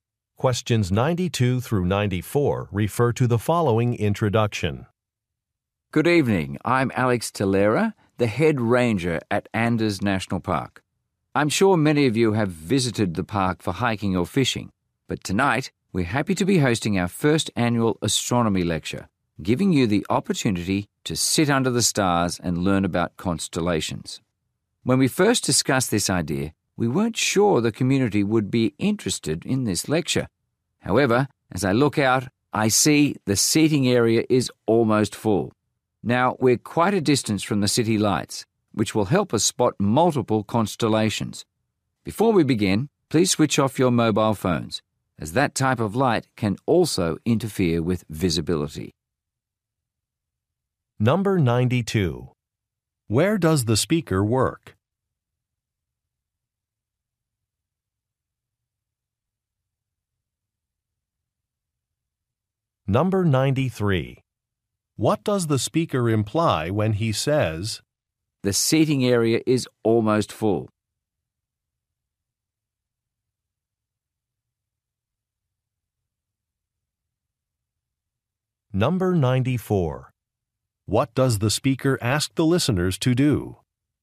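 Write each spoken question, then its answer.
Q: Where does the speaker work?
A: At a national park

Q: What does the speaker ask the listeners to do?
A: Switch off their mobile phones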